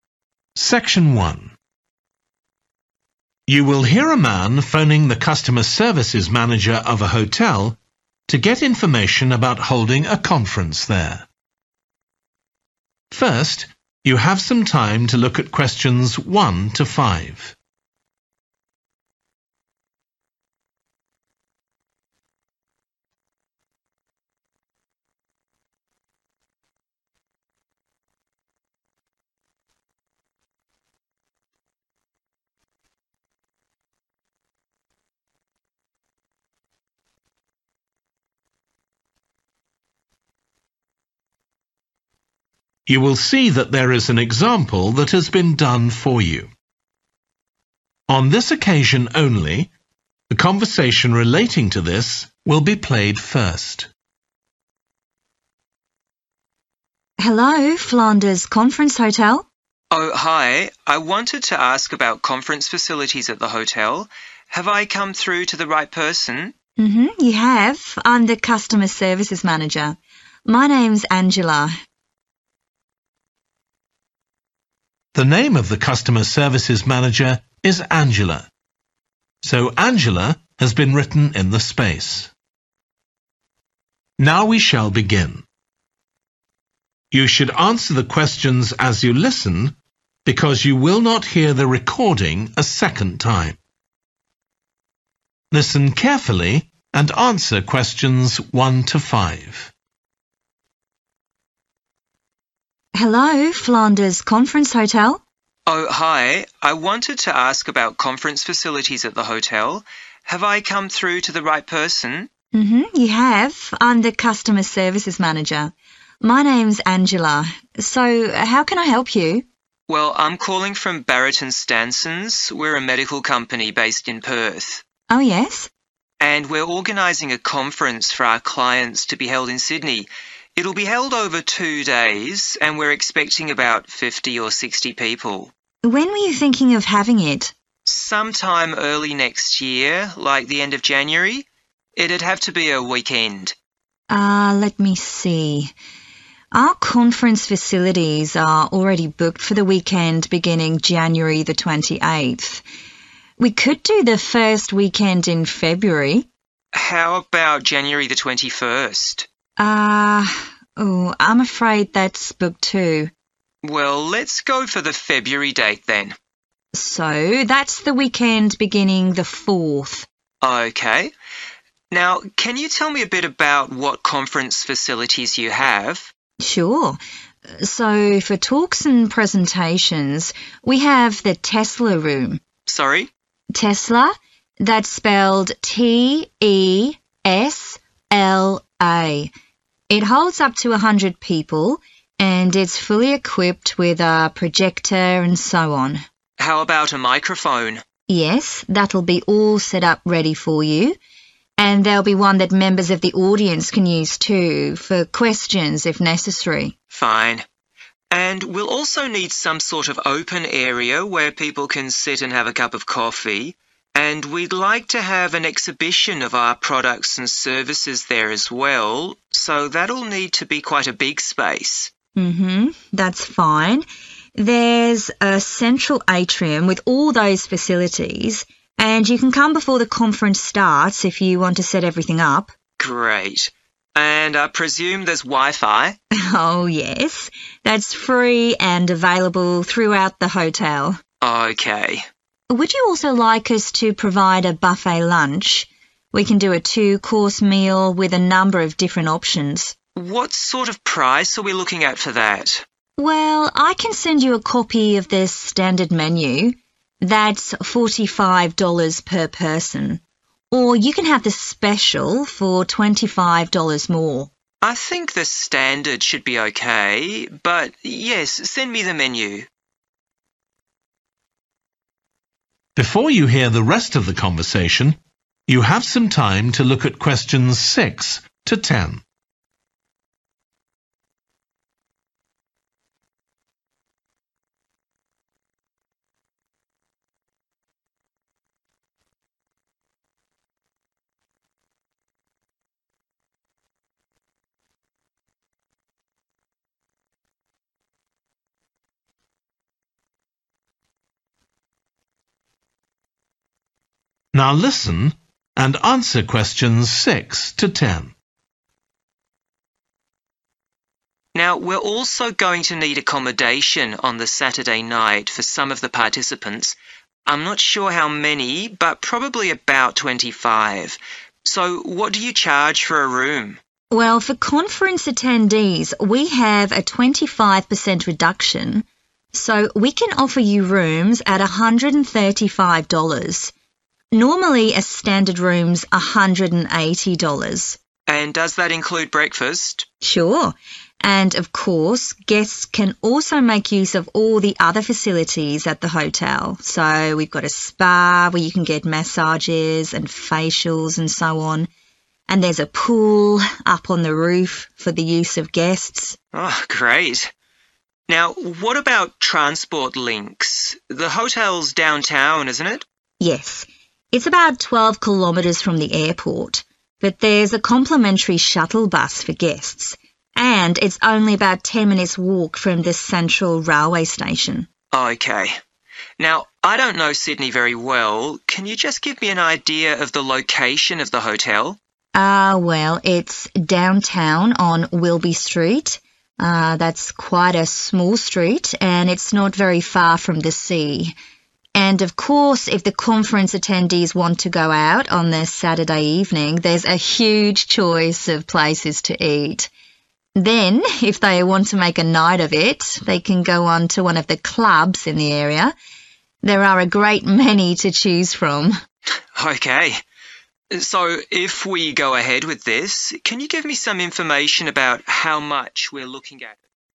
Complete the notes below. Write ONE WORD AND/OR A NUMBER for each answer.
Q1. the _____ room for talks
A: Tesla

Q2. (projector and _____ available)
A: microphone

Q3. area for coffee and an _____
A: exhibition

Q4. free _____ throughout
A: wifi

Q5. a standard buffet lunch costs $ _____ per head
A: 45

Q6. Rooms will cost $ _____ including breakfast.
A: 135

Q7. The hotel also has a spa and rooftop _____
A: pool

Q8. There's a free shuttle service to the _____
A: airport

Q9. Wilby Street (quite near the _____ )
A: sea

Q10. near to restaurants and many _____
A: clubs

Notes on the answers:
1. The transcript is providing the correct spelling of a word, Tesla. Answer Explanation: The answer 'Tesla' is the word that needs to be inserted in the notes. Reason For Correctness: The correct answer matches the information provided in the excerpt, confirming the correct spelling of the word needed for the notes.
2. The transcript says, "How about a microphone?" This means someone is asking if a microphone is available. Answer Explanation: The answer is "microphone." This word means a device that makes sound louder. Reason For Correctness: The correct answer is "microphone" because the excerpt is asking about what equipment is available for talks, and the text mentions "projector" and a blank. The excerpt suggests a "microphone" should be used during the talks, so it's the missing thing.
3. The transcript says 'we'd like to have an exhibition of our products and services there as well.' This means that the company wants to show their products and services to people at a place. Answer Explanation: The answer 'exhibition' means a public event where products are displayed and shown to visitors. Reason For Correctness: The correct answer 'exhibition' is correct because the excerpt mentions showing 'products and services'. This is exactly what happens at an exhibition.
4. The transcript suggests that the person is asking if there is free access to the internet available at the hotel. Answer Explanation: The answer 'wifi' refers to a wireless network that allows electronic devices to connect to the internet without using cables. Reason For Correctness: The correct answer 'wifi' aligns with the question in the excerpt as it directly addresses the availability of internet access, which is commonly referred to as wifi in the context of hotels and other public spaces.
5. The transcript says that the cost is $45 for each person. Answer Explanation: The answer '45' represents the price in dollars. Reason For Correctness: The correct answer '45' is the price mentioned in the excerpt. The excerpt states the cost of a standard buffet lunch is $45 per person, which matches the answer.
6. The transcript mentions that for conference attendees, the price for rooms will be reduced by 25%, making the cost per room $135. Answer Explanation: The answer '135' represents the cost, in dollars, for each room including breakfast. Reason For Correctness: The correct answer matches the reduced cost mentioned in the excerpt, which is $135 per room after a 25% reduction for conference attendees.
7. The transcript says that the hotel has a spa with massages and facials, and a pool on the top of the building for guests. Answer Explanation: The answer is 'pool', which is a place with water where people can swim. Reason For Correctness: The correct answer is 'pool' because the excerpt says "There's a free shuttle service to the pool" and the text asks for the name of a facility at the hotel. So the pool is a facility at the hotel.
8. The transcript mentions that the hotel is located around 12 kilometers away from the airport. Answer Explanation: The answer refers to the location where the free shuttle service from the hotel goes, which is the airport. Reason For Correctness: The correct answer fits the context because it matches the location mentioned in the excerpt where the airport is located approximately 12 kilometers away from the Flanders Conference Hotel.
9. The transcript says the hotel is on Wilby Street, a small street, and it's close to the ocean. Answer Explanation: The answer 'sea' means the same as 'ocean'. Reason For Correctness: The correct answer is 'sea' because the excerpt says the hotel is near the sea, and 'sea' is a word that describes a large body of salt water.
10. The transcript mentions that if guests want to go out after the conference, they have the option to visit one of the clubs in the area. Answer Explanation: The answer 'clubs' refers to entertainment venues or social places where guests can socialize, dance, or have drinks. Reason For Correctness: The correct answer is 'clubs' because the excerpt specifically mentions that there are many clubs in the area for guests to choose from for entertainment after the conference. This aligns with the context of offering guests additional options for leisure activities nearby.

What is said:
ANGELA: Hello, Flanders conference hotel.
MAN: Oh, hi. I wanted to ask about conference facilities at the hotel. Have I come through to the right person?
ANGELA: You have. So how can I help you?
MAN: Well, I'm calling from Barrett and Stansons, we're a medical company based in Perth.
ANGELA: Oh yes.
MAN: And we're organising a conference for our clients to be held in Sydney. It'll be held over two days and we're expecting about fifty or sixty people.
ANGELA: When were you thinking of having it?
MAN: Some time early next year, like the end of January? It'd have to be a weekend.
ANGELA: Let me see ... our conference facilities are already booked for the weekend beginning January 28th. We could do the first weekend in February?
MAN: How about January 21st?
ANGELA: I'm afraid that's booked too.
MAN: Well, let's go for the February date then.
ANGELA: So that's the weekend beginning the 4th.
MAN: OK. Now can you tell me a bit about what conference facilities you have?
ANGELA: Sure. So for talks and presentations we have the Tesla room.
MAN: Sorry?
ANGELA: Tesla – that's spelled T-E-S-L-A. it holds up to a hundred people, and it's fully equipped with a projector and so on.
MAN: How about a microphone?
ANGELA: Yes, that'll be all set up ready for you, and there'll be one that members of the audience can use too, for questions, if necessary.
MAN: Fine. And we'll also need some sort of open area where people can sit and have a cup of coffee, and we'd like to have an exhibition of our products and services there as well, so that'll need to be quite a big space.
ANGELA: That's fine, there's a central atrium with all those facilities, and you can come before the conference starts if you want to set everything up.
MAN: Great. And I presume there's wifi?
ANGELA: Oh yes, that's free and available throughout the hotel.
MAN: OK.
ANGELA: Would you also like us to provide a buffet lunch? We can do a two-course meal with a number of different options.
MAN: What sort of price are we looking at for that?
ANGELA: Well, I can send you a copy of the standard menu. That's $45 per person. Or you can have the special for $25 more.
MAN: I think the standard should be OK, but yes, send me the menu.
MAN: Now we're also going to need accommodation on the Saturday night for some of the participants ... I'm not sure how many, but probably about 25. So what do you change for a room?
ANGELA: Well, for conference attendees we have a 25% reduction, so we can offer you rooms at $135. Normally a standard room's $180.
MAN: And does that include breakfast?
ANGELA: Sure. And of course, guests can also make use of all the other facilities at the hotel. So we've got a spa where you can get massages and facials and so on, and there's a pool up on the roof for the use of guests.
MAN: Great. Now what about transport links? The hotel's downtown, isn't it?
ANGELA: Yes, it's about 12 kilometres from the airport, but there's a complimentary shuttle bus for guests. And it's only about ten minutes' walk from the central railway station.
MAN: OK. Now, I don't know Sydney very well, can you just give me an idea of the location of the hotel?
ANGELA: Well, it's downtown on Wilby Street, that's quite a small street, and it's not very far from the sea. And of course if the conference attendees want to go out on the Saturday evening there's a huge choice of places to eat. Then if they want to make a night of it, they can go on to one of the clubs in the area – there are a great many to choose from.
MAN: OK. So if we go ahead with this, can you give me some information about how much ...